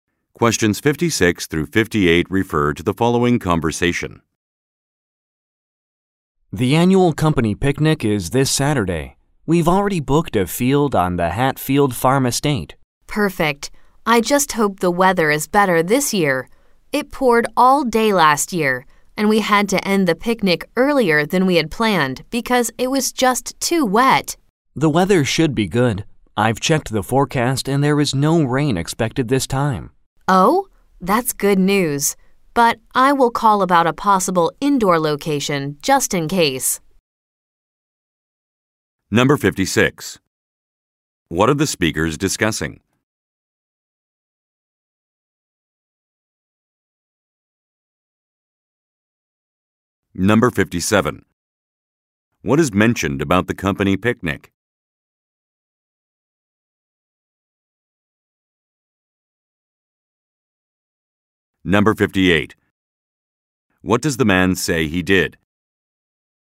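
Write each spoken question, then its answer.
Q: What are the speakers discussing?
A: The annual company picnic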